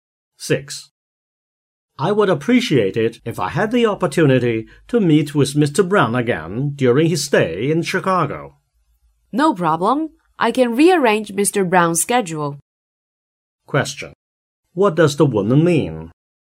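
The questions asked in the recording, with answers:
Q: What does the woman mean?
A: She can rearrange Mr. Brown's schedule so the man can meet him.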